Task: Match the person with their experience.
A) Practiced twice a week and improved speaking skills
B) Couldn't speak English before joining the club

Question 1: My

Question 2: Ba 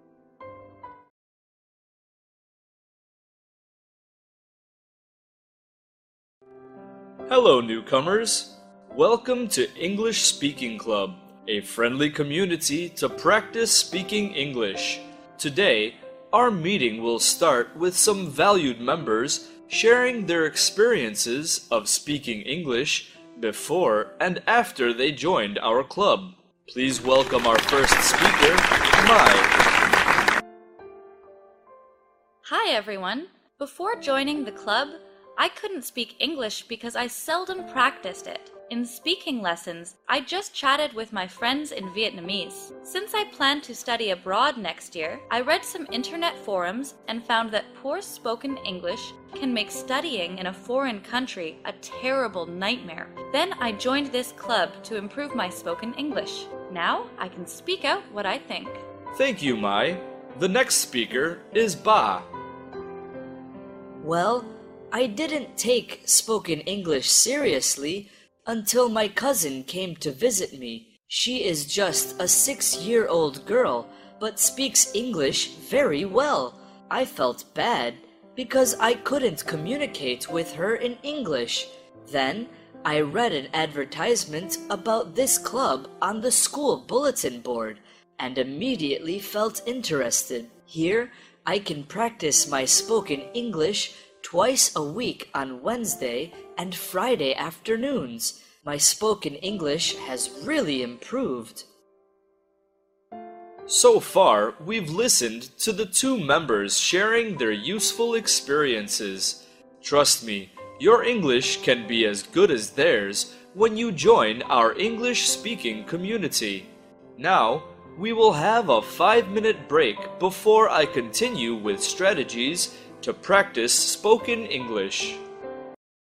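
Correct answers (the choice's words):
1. Couldn't speak English before joining the club
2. Practiced twice a week and improved speaking skills

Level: lớp 8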